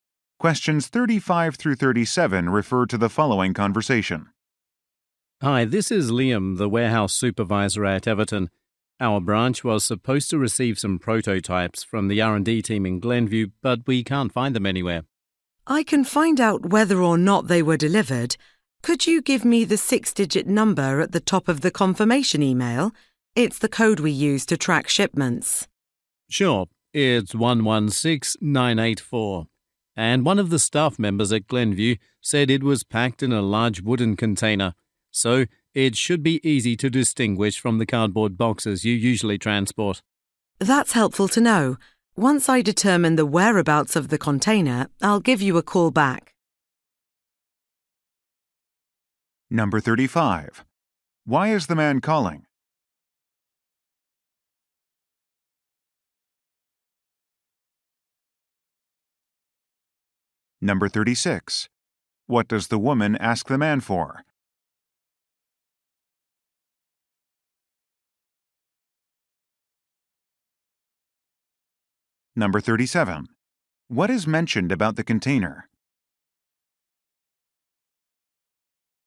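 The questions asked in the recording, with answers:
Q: Why is the man calling?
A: The prototypes have not been found; he wants to check the delivery.

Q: What does the woman ask the man for?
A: The tracking number from the confirmation email.

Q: What is mentioned about the container?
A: It is a large wooden container.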